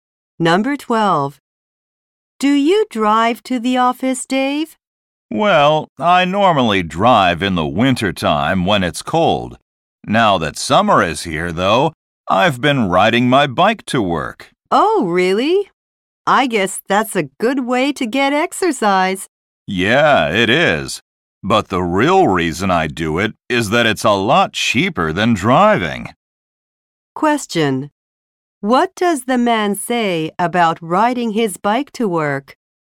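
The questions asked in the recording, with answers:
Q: What does the man say about riding his bike to work?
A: It is cheaper than driving.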